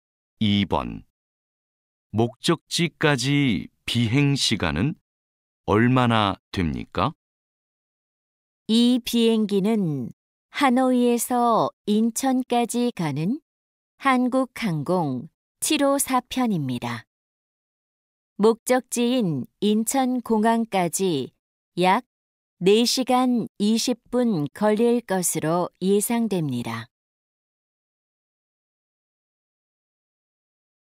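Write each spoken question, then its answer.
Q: 목적지까지 비행시간은 얼마나 됩니까?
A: 약 4시간 20분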